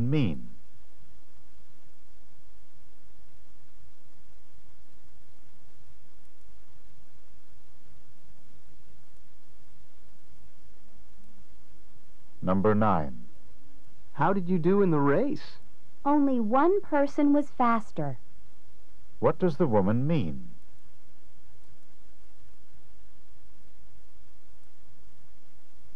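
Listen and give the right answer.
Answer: She came in second.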